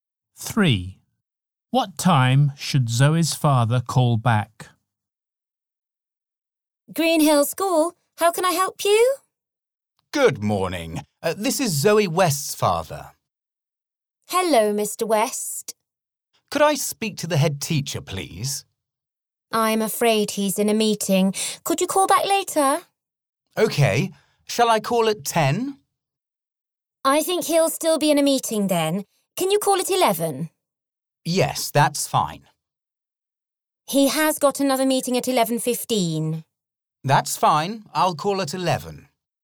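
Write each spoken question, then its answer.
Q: What time should Zoe's father call back?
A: At 11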